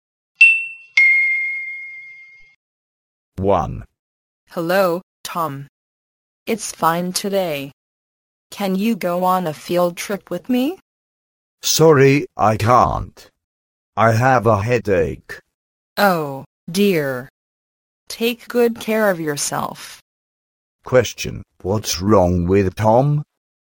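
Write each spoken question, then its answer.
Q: Question, what's wrong with Tom?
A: He has a headache.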